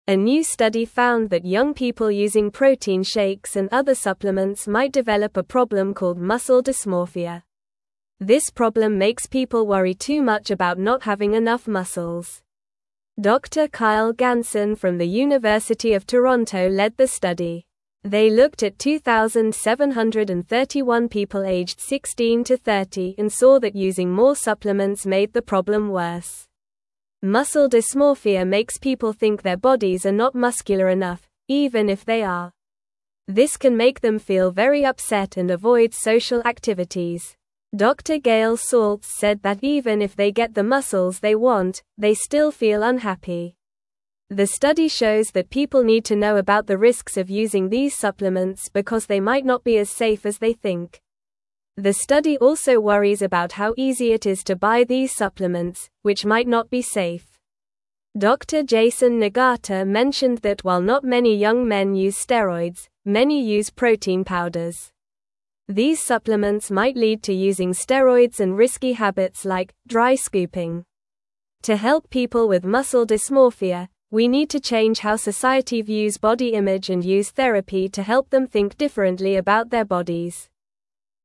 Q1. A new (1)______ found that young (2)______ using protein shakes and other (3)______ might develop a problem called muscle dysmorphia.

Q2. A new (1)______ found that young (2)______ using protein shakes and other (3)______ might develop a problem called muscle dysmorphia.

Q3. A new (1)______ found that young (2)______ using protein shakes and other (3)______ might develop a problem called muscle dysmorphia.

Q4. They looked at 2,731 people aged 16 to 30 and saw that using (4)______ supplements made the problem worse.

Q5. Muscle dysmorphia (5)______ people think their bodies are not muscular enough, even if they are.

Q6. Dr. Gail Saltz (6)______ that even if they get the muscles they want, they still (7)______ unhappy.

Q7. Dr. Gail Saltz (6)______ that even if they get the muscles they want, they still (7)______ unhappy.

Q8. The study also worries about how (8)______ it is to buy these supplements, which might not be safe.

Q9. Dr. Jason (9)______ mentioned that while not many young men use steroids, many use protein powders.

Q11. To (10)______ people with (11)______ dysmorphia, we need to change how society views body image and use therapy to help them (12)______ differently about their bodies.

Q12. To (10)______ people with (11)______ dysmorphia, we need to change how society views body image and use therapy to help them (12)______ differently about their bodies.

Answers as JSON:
{"1": "study", "2": "people", "3": "supplements", "4": "more", "5": "makes", "6": "said", "7": "feel", "8": "easy", "9": "Nagata", "11": "muscle", "12": "think"}

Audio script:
A new study found that young people using protein shakes and other supplements might develop a problem called muscle dysmorphia. This problem makes people worry too much about not having enough muscles. Dr. Kyle Ganson from the University of Toronto led the study. They looked at 2,731 people aged 16 to 30 and saw that using more supplements made the problem worse.
Muscle dysmorphia makes people think their bodies are not muscular enough, even if they are. This can make them feel very upset and avoid social activities. Dr. Gail Saltz said that even if they get the muscles they want, they still feel unhappy. The study shows that people need to know about the risks of using these supplements because they might not be as safe as they think.
The study also worries about how easy it is to buy these supplements, which might not be safe. Dr. Jason Nagata mentioned that while not many young men use steroids, many use protein powders. These supplements might lead to using steroids and risky habits like "dry scooping." To help people with muscle dysmorphia, we need to change how society views body image and use therapy to help them think differently about their bodies.

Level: Level 2